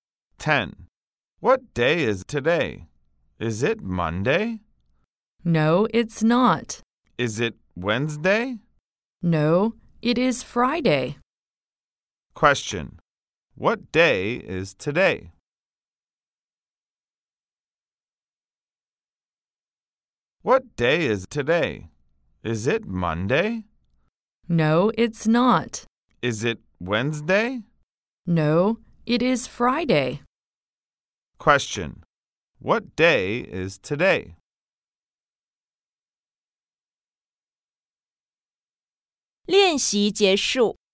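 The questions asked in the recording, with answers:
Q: What day is today?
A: Friday.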